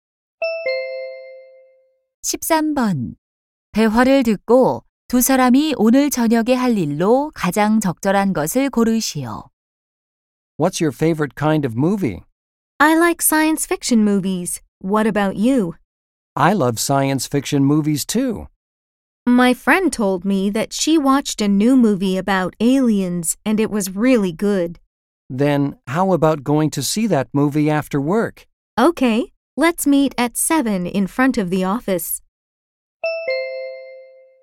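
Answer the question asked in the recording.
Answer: 외계인에 관한 공상과학 영화 보기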